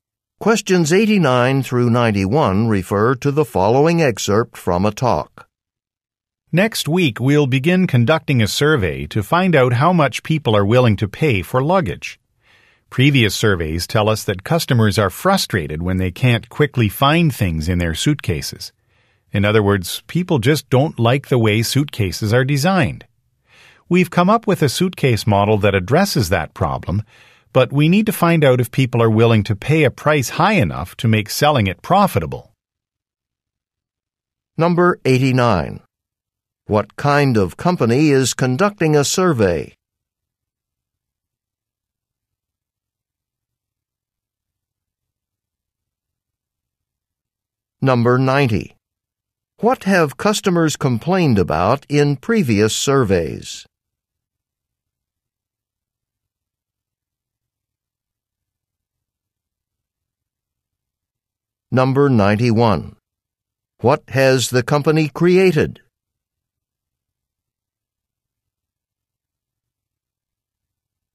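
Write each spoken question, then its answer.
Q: What kind of company is conducting a survey?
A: A luggage company

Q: What have customers complained about in previous surveys?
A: They can't quickly find things in their suitcases

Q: What has the company created?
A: A new suitcase model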